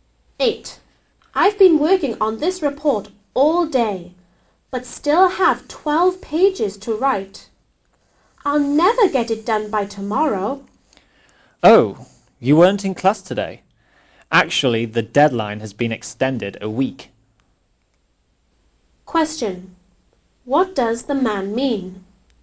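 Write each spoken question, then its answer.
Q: What does the man mean?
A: The deadline has been extended a week, so the report is not due tomorrow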